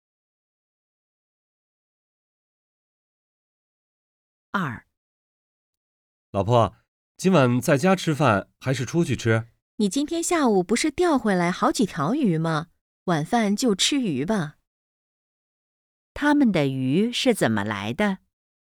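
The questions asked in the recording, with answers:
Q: 他们的鱼是怎么来的?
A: 钓回来的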